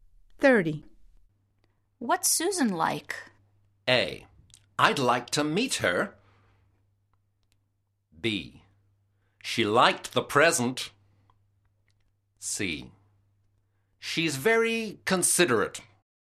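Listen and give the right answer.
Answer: C: She's very considerate.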